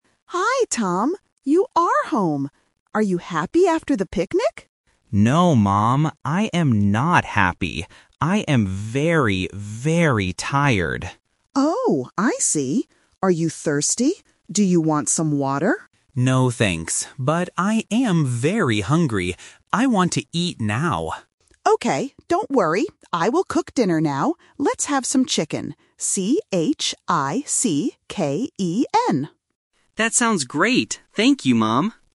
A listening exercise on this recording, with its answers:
Listen to the conversation and choose the correct answer for each question.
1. How does the son feel?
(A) Happy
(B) Tired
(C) Sad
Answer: (B) Tired

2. What does the son want?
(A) Some water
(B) To sleep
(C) Some food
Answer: (C) Some food

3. What will the mother cook for dinner?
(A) Kitchen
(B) Chicken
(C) Cake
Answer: (B) Chicken

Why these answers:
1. The mother asks if he is "happy" (Option A), but the son says "No, I am not happy. I am very tired." Option (C) "Sad" is not mentioned in the story.
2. The mother asks if he wants "water" (Option A), but he says "No." He says he is "hungry" and "wants to eat," which means he wants food (Option C). Option (B) "To sleep" is not mentioned.
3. The mother says "Let's have some chicken" and spells it out "C-H-I-C-K-E-N." Option (A) "Kitchen" is a sound trap because it sounds similar to "Chicken." Option (C) "Cake" is not mentioned.

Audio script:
Mother: Hi, Tom. You are home! Are you happy after the picnic?
Son: No, Mom. I am not happy. I am very, very tired.
Mother: Oh, I see. Are you thirsty? Do you want some water?
Son: No, thanks. But I am very hungry. I want to eat now.
Mother: Okay, don't worry. I will cook dinner now. Let's have some chicken.
Son: That sounds great. Thank you, Mom!

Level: A1

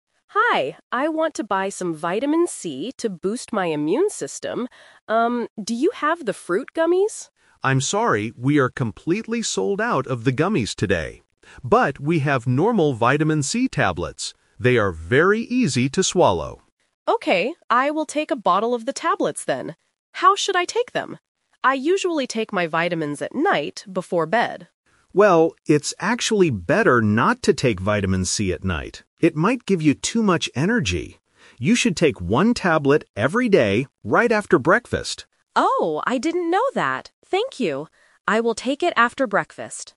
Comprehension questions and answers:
Listen to the conversation between a customer and a pharmacist. Choose the correct answer (A, B, or C) for each question.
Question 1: What kind of Vitamin C does the customer buy?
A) Fruit gummies.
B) Liquid medicine.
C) Normal tablets.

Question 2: Why doesn't the customer buy the fruit gummies?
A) Because they are too expensive.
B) Because the pharmacy is sold out of them.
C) Because they have too much sugar.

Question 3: When should the customer take the Vitamin C?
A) At night before bed.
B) Right after breakfast.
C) Before eating breakfast.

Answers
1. C) Normal tablets.
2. B) Because the pharmacy is sold out of them.
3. B) Right after breakfast.

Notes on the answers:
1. The customer agrees and says, "I will take a bottle of the tablets then." Option (A) is a trap; she originally asked for fruit gummies, but the pharmacy didn't have any. Option (B) is a plausible type of medicine, but it is not mentioned in the audio.
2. The pharmacist clearly states, "we are completely sold out of the gummies today." Options (A) and (C) are plausible reasons for not buying gummies, but they are never mentioned in the conversation.
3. The pharmacist gives the instruction: "You should take one tablet every day, right after breakfast." Option (A) is a trap; taking vitamins at night is the customer's usual habit, but the pharmacist tells her not to do it with Vitamin (C) Option (C) is a trap using the word "breakfast", but the instruction is to take it after eating, not before.

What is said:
Customer: Hi, I want to buy some Vitamin C to boost my immune system. Um, do you have the fruit gummies?
Pharmacist: I'm sorry, we are completely sold out of the gummies today. But we have normal Vitamin C tablets. They are very easy to swallow.
Customer: Okay, I will take a bottle of the tablets then. How should I take them? I usually take my vitamins at night before bed.
Pharmacist: Well, it's actually better not to take Vitamin C at night. It might give you too much energy. You should take one tablet every day, right after breakfast.

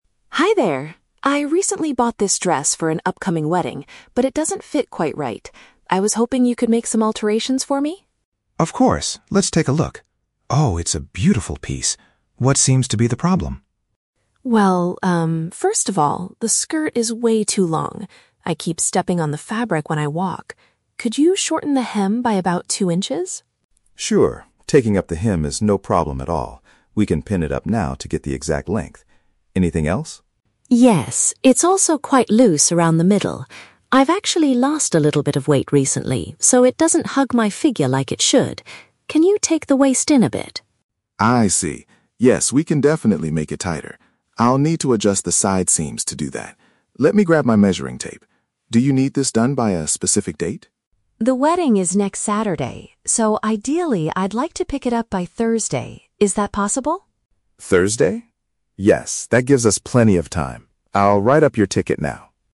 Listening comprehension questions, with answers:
Listen to the conversation between a customer and a tailor. For each question, choose the correct answer (A, B, or C).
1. Why does the customer need the length of her dress changed?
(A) She accidentally tore the bottom of the skirt.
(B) She keeps tripping over the extra material.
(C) She wants it to look appropriate for a formal wedding.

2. What is the second adjustment the customer asks for?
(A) Making the middle part of the dress tighter.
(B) Replacing the zipper along the side seams.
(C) Letting out the waist because she gained weight.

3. When does the customer intend to collect the finished dress?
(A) Later this afternoon.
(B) Next Saturday.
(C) On Thursday.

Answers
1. (B) She keeps tripping over the extra material.
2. (A) Making the middle part of the dress tighter.
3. (C) On Thursday.

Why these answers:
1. The customer states that the skirt is "way too long" and she keeps "stepping on the fabric," which is paraphrased as "tripping over the extra material." Option A is a trap; she stepped on it, but she didn't tear it. Option C is a trap because the "wedding" is mentioned as the event she is attending, but it is not the reason she needs the length shortened.
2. The customer mentions the dress is "quite loose around the middle" and asks to "take the waist in," which the tailor confirms means to "make it tighter." Option B is a trap; the tailor mentions adjusting the "side seams," but says nothing about a zipper. Option C is the exact opposite of the truth; she lost weight, not gained it.
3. The customer explicitly states, "I'd like to pick it up by Thursday." Option A is not mentioned in the audio. Option B is a trap; "next Saturday" is the day of the wedding, not the day she will collect the dress from the tailor.

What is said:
Customer: Hi there. I recently bought this dress for an upcoming wedding, but it doesn't fit quite right. I was hoping you could make some alterations for me.
Tailor: Of course, let's take a look. Oh, it's a beautiful piece. What seems to be the problem?
Customer: Well, um, first of all, the skirt is way too long. I keep stepping on the fabric when I walk. Could you shorten the hem by about two inches?
Tailor: Sure, taking up the hem is no problem at all. We can pin it up now to get the exact length. Anything else?
Customer: Yes. It's also quite loose around the middle. I've actually lost a little bit of weight recently, so it doesn't hug my figure like it should. Can you take the waist in a bit?
Tailor: I see. Yes, we can definitely make it tighter. I'll need to adjust the side seams to do that. Let me grab my measuring tape. Do you need this done by a specific date?
Customer: The wedding is next Saturday, so ideally, I'd like to pick it up by Thursday. Is that possible?
Tailor: Thursday? Yes, that gives us plenty of time. I'll write up your ticket now.

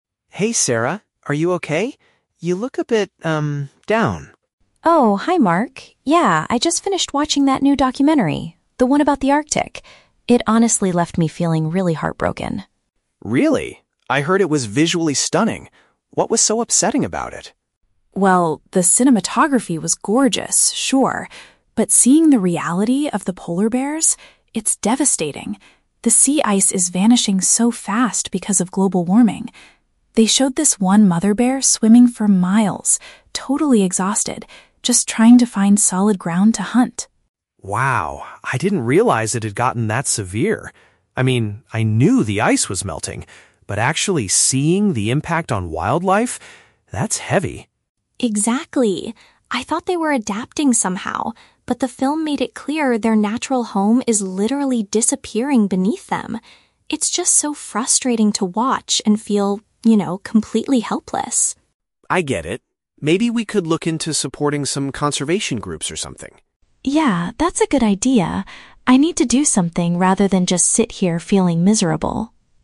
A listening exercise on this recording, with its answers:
Listen to the conversation between the two roommates and choose the best answer (A, B, or C) for each question below.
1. How did Sarah primarily feel after finishing the documentary?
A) She was amazed by the beautiful cinematography.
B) She was deeply saddened by the reality of the animals.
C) She was confused about the causes of global warming.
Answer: B) She was deeply saddened by the reality of the animals.

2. According to Sarah, what is the main issue affecting the polar bears?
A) They are struggling because their habitat is melting away.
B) They are exhausted from fighting with other bears.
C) They are being helped by conservation groups.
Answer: A) They are struggling because their habitat is melting away.

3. What did Sarah initially think about the polar bears before watching the film?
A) She believed they were completely helpless.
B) She assumed they were finding ways to adjust to the changes.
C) She thought people were doing enough to save them.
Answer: B) She assumed they were finding ways to adjust to the changes.

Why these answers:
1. Sarah says she felt "heartbroken" and "devastated" by the reality of the polar bears. "Heartbroken" is a synonym for "deeply saddened".
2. Sarah explains that "the sea ice is vanishing" and their "natural home is literally disappearing," which means their habitat is melting away.
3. Sarah says, "I thought they were adapting somehow." The word "adjust" in option B is a paraphrase of "adapt".

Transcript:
Mark: Hey, Sarah. Are you okay? You look a bit, um, down.
Sarah: Oh, hi Mark. Yeah, I just finished watching that new documentary... the one about the Arctic. It honestly left me feeling really heartbroken.
Mark: Really? I heard it was visually stunning. What was so upsetting about it?
Sarah: Well, the cinematography was gorgeous, sure. But seeing the reality of the polar bears... it's devastating. The sea ice is vanishing so fast because of global warming. They showed this one mother bear swimming for miles, totally exhausted, just trying to find solid ground to hunt.
Mark: Wow, I didn't realize it had gotten that severe. I mean, I knew the ice was melting, but actually seeing the impact on wildlife... that's heavy.
Sarah: Exactly. I thought they were adapting somehow, but the film made it clear their natural home is literally disappearing beneath them. It's just so frustrating to watch and feel, you know, completely helpless.
Mark: I get it. Maybe we could look into supporting some conservation groups or something?
Sarah: Yeah, that's a good idea. I need to do something rather than just sit here feeling miserable.

